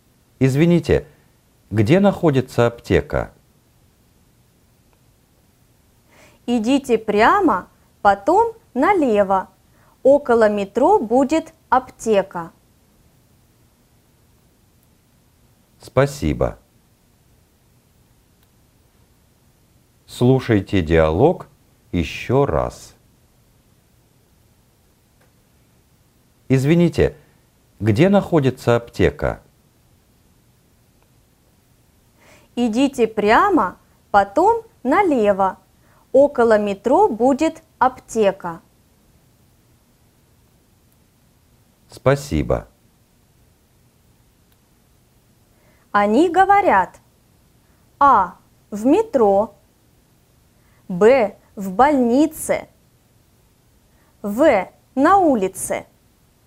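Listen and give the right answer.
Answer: В: На улице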